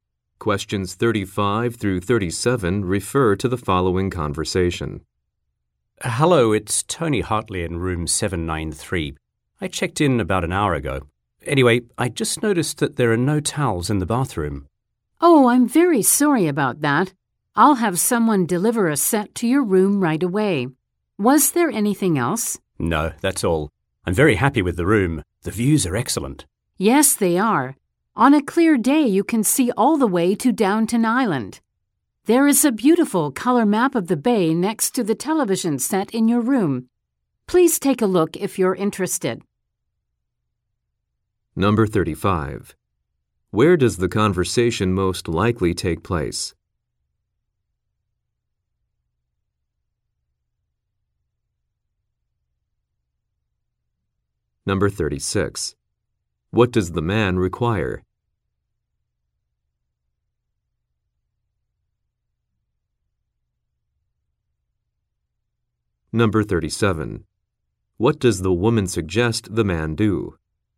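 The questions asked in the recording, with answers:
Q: Where does the conversation most likely take place?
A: At a hotel

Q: What does the man require?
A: Towels

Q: What does the woman suggest the man do?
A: Look at the map of the bay in his room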